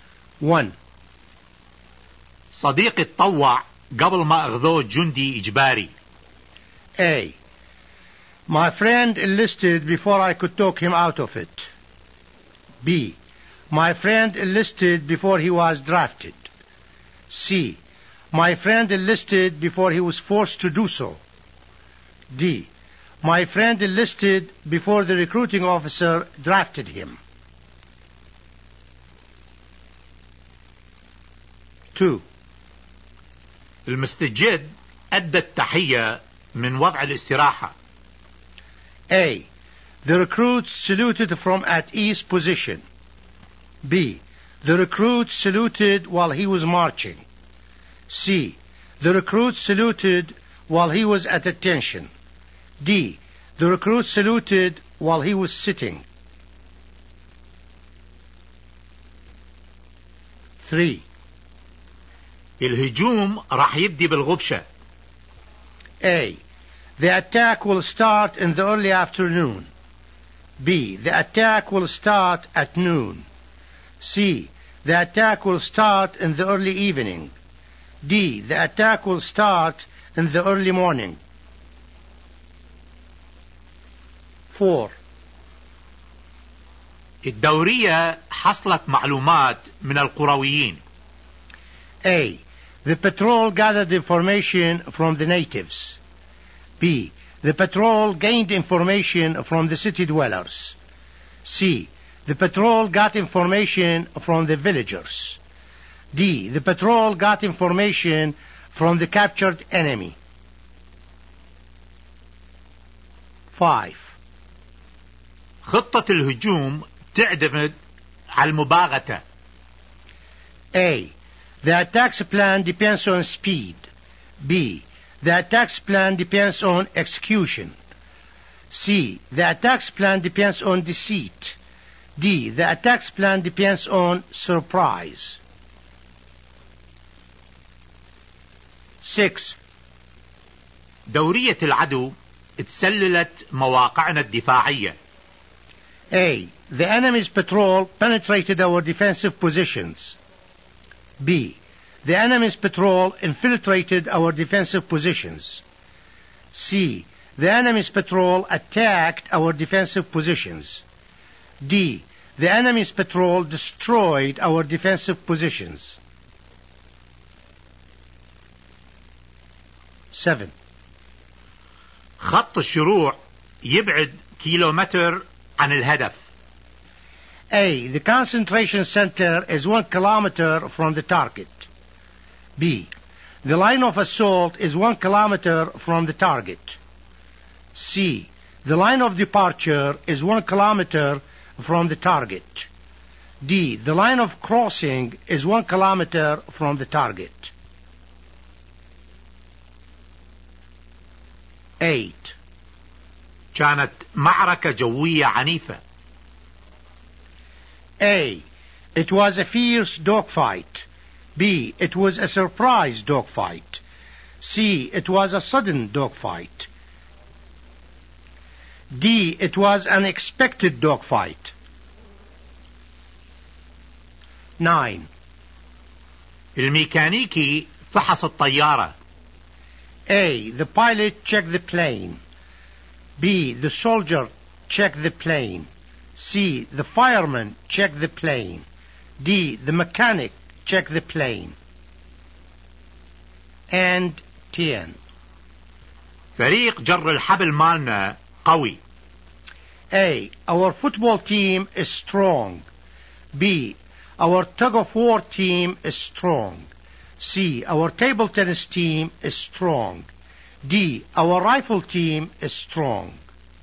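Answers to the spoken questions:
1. B: My friend enlisted before he was drafted.
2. A: The recruit saluted from at ease position.
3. D: The attack will start in the early morning.
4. C: The patrol got information from the villagers.
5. D: The attack's plan depends on surprise.
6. B: The enemy's patrol infiltrated our defensive positions.
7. C: The line of departure is 1 kilometer from the target.
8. A: It was a fierce dogfight.
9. D: The mechanic check the plane.
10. B: Our tug of war team is strong.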